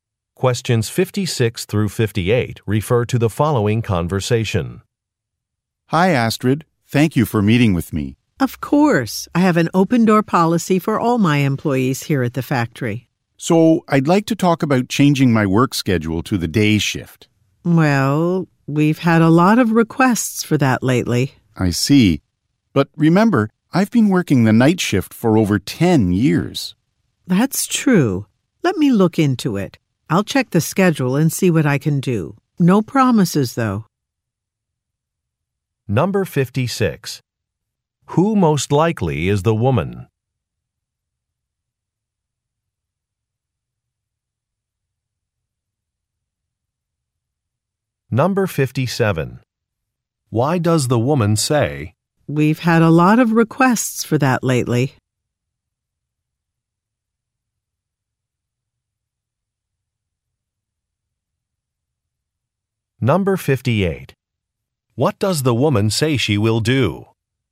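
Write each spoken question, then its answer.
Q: Who most likely is the woman?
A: A factory supervisor

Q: Why does the woman say,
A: To indicate the request may be hard to grant

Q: What does the woman say she will do?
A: Check the schedule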